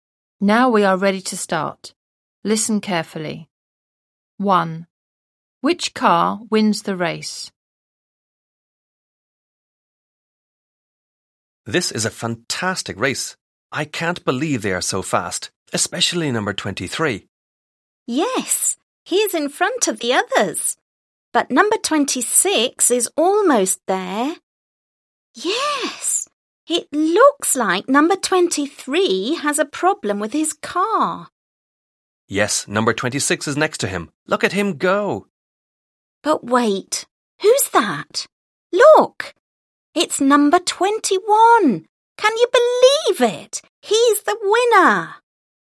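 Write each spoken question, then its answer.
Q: Which car wins the race?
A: Number 21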